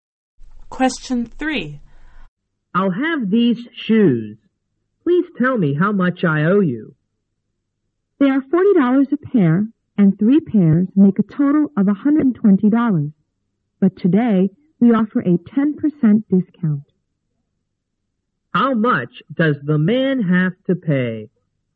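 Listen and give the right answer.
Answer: $108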